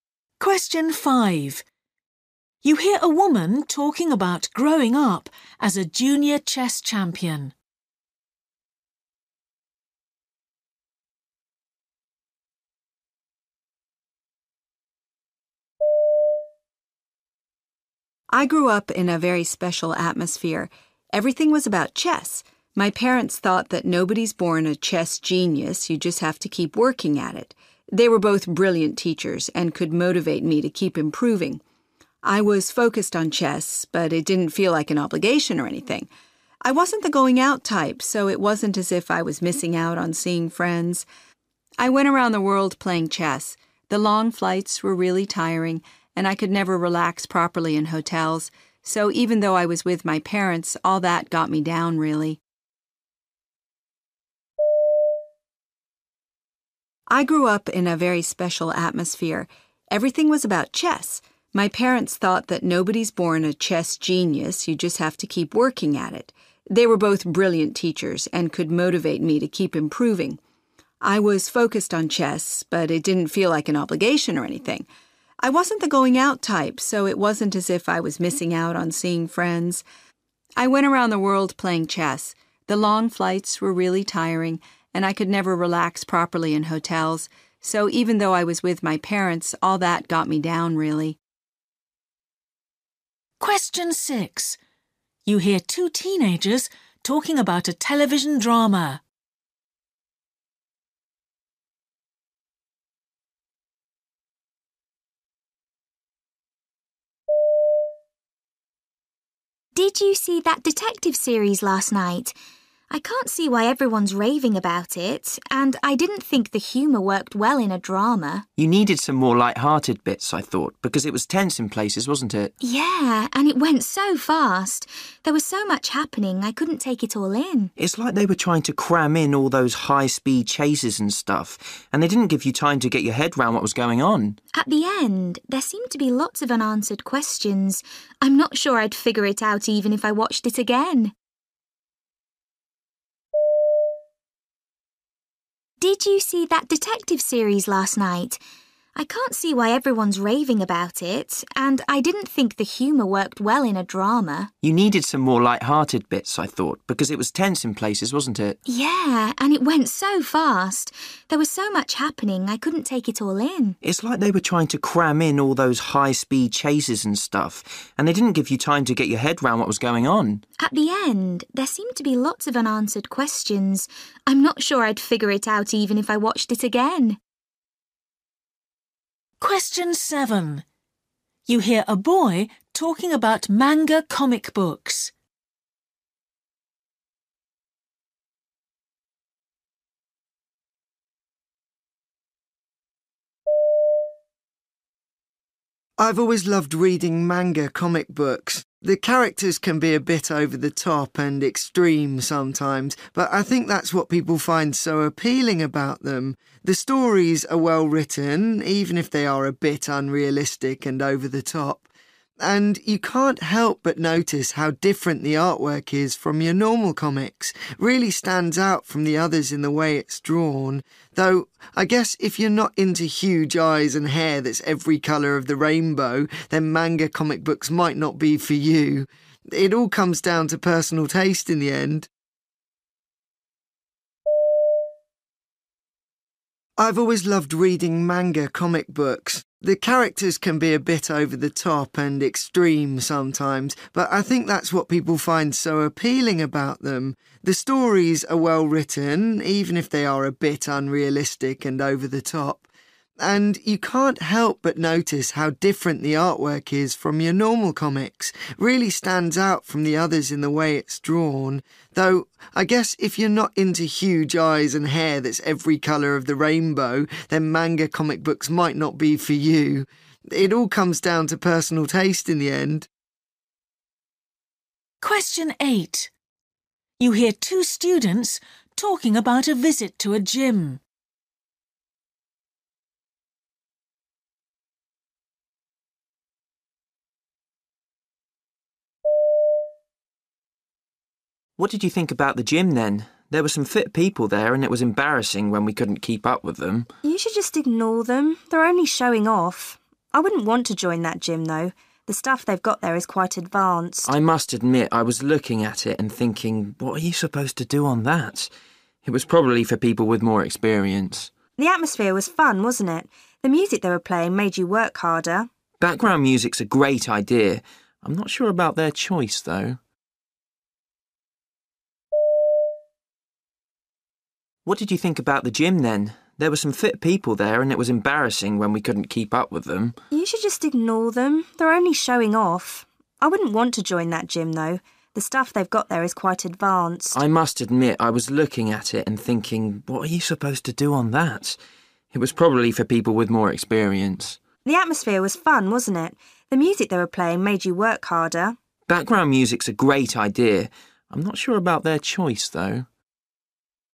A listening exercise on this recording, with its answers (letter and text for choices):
For questions 1-8, choose the best answer A, B or C.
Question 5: What did she find difficult about it?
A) the effect it had on her friendships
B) the amount of travelling that was required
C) the pressure from her parents to succeed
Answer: B) the amount of travelling that was required

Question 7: He thinks some people dislike them because of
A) the predictable stories.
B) the particular artistic style.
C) the uninspiring characters.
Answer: B) the particular artistic style.

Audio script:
But over time, that dream changed. At high school she became fascinated by psychology. She was especially keen to study how technology influences the was people act. Miriam, who's blind, relies on technology in her own life, but her research was driven by a curiosity about how technology influences the was people act around each other. In particular she wanted to do research into why people are so attached to their mobile phones.
5
Woman: I grew up in a very special atmosphere. Everything was about chess. My parents thought that nobody's born a chess genius, you just have to keep working at it. They were both brilliant teachers and could motivate me to keep improving. I was focused on chess, but it didn't feel like an obligation or anything. I wasn't the going out type, so it wasn't as if I was missing out on seeing friends. I went around the world playing chess. The long flights were really tiring and I could never relax properly in hotels. So, even though I was with my parents, all that got me down really.
Girl: Did you see that detective series last night? I can't see why everyone's raving about it, and I didn't think the humour worked well in a drama.
Boy: You needed some more light-hearted bits, I thought, because it was tense in places, wasn't it?
Girl: Yeah, and it went so fast. There was so much happening, I couldn't take it all in.
Boy: It's like they were trying to cram in all those high-speed chases and stuff, and they didn't give you time to get your head round what was going on.
Girl: At the end there seemed to be lots of unanswered questions. I'm not sure I'd figure it out even if I watched it again.
7
Boy: I've always loved reading manga comic books. The characters can be a bit over the top and extreme sometimes, but I think that's what people find so appealing about them. The stories are well written, even if they are a bit unrealistic and over the top. And you can't help but notice how different the artwork is from your normal comics; it really stands out from the others in the way it's drawn, though I guess if you're not into huge eyes and hair that's every colour of the rainbow, then manga comic books might not be for you. It all comes down to personal taste in the end.
8
Boy: What did you think about the gym then? There were some fit people there and it was embarrassing when we couldn't keep up with them.
Girl: You should just ignore them. They're only showing off. I wouldn't want to join that gym, though. The stuff they've got there is quite advanced.
Boy: I must admit I was looking at it and thinking: 'What are you supposed to do on that?' It was probably for people with more experience.
Girl: The atmosphere was fun, wasn't it? The music they were playing made you work harder.
Boy: Background music's a great idea – I'm not sure about their choice, though.